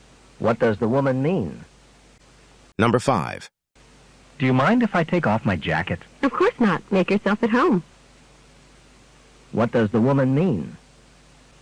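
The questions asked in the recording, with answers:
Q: What does the woman mean?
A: The man may take off his jacket.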